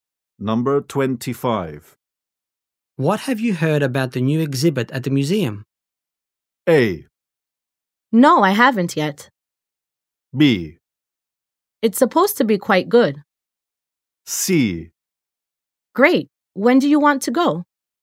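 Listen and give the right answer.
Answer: B: It's supposed to be quite good.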